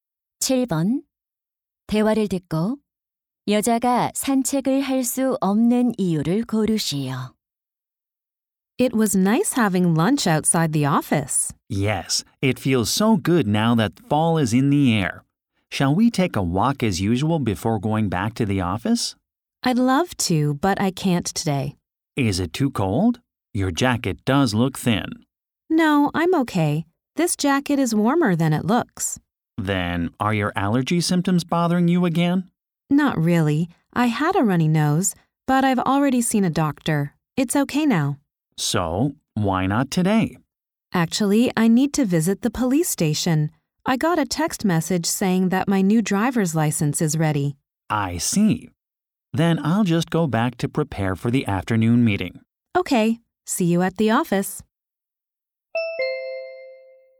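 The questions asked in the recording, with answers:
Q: 대화를 듣고 여자가 산책을 할 수 없는 이유를 고르시오.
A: 새 운전면허증을 찾으러 경찰서에 가야 해서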